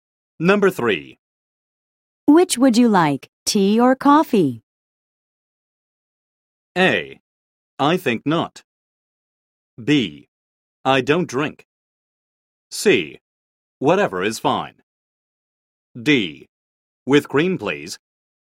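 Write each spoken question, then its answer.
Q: Which would you like, tea or coffee?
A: C: Whatever is fine.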